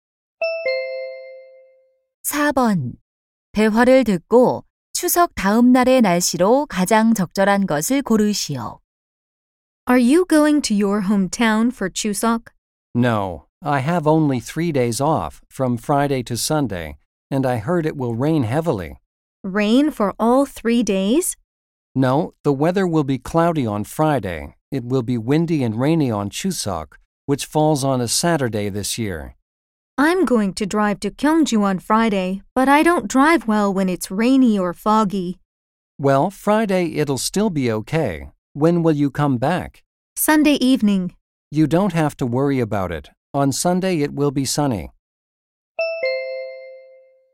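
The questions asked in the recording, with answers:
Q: 대화를 듣고 추석 다음 날의 날씨로 가장 적절한 것을 고르시오.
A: 맑음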